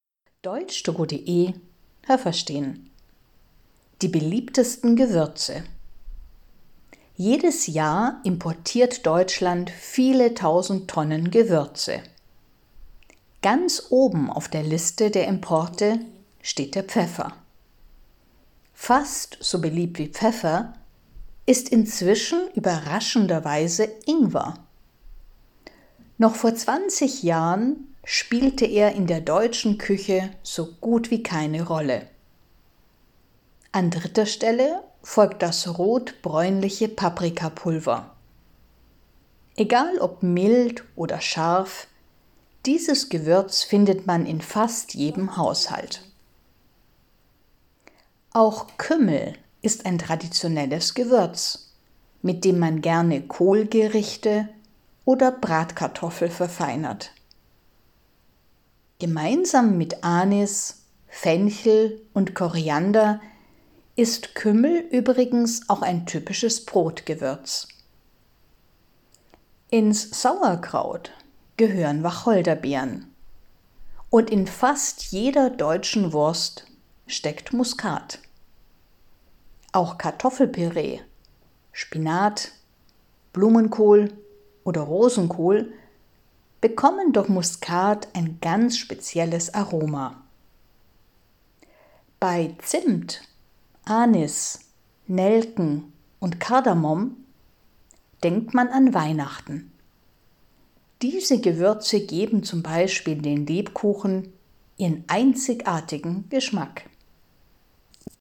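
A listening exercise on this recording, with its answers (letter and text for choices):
Was haben Sie gehört? Es gibt nur eine korrekte Antwort.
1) Deutschland importiert viele Gewürze, am beliebtesten ist ...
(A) Pfeffer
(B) Ingwer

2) Vor 20 Jahren war Ingwer in Deutschland ...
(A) schon sehr beliebt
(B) nicht so wichtig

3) Paprikapulver ist ...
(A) mild oder scharf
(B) immer scharf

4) Kümmel passt gut ...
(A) zu Kartoffelsalat und Bratwurst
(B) zu Kohl (z.B. Blumenkohl, Rosenkohl)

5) Wacholderbeeren sind ...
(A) im Brot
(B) im Sauerkraut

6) In den deutschen Würsten ist sehr oft ...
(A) Spinat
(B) Muskat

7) Zimt, Anis, Nelken und Kardamom sind typische Gewürze ...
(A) für Lebkuchen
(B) für Geburtstagskuchen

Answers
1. (A) Pfeffer
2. (B) nicht so wichtig
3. (A) mild oder scharf
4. (B) zu Kohl (z.B. Blumenkohl, Rosenkohl)
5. (B) im Sauerkraut
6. (B) Muskat
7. (A) für Lebkuchen

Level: A2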